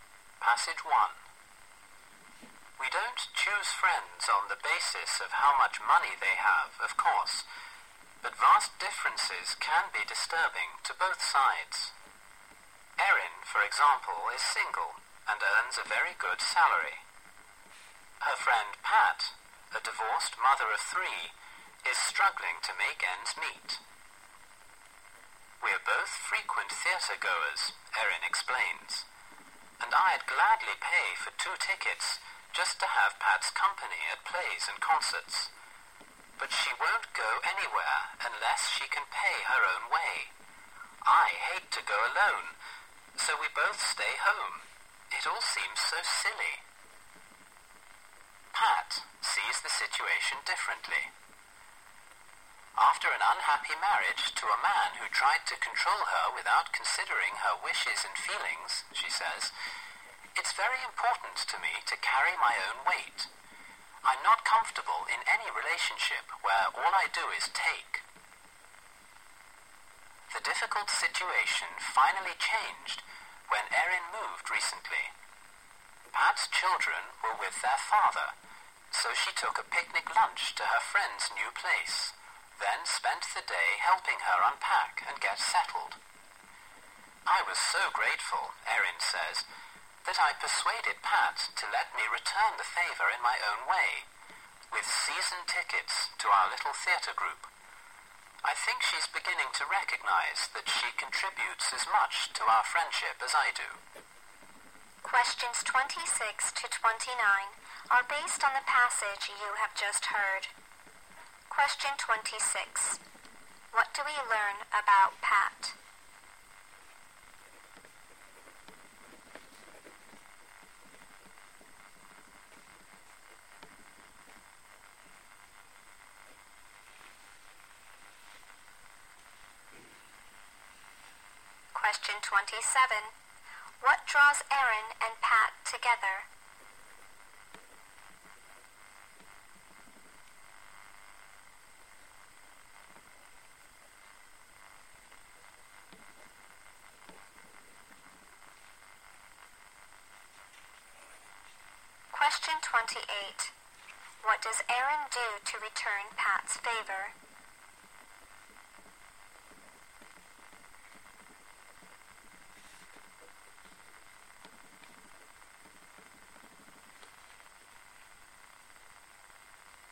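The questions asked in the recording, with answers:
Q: What do we learn about Pat?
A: She is a divorced mother of three who struggles financially and insists on paying her own way.

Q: What draws Erin and Pat together?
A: Their love of going to the theatre.

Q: What does Aaron do to return Pat's favor?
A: She gives Pat season tickets to their little theater group.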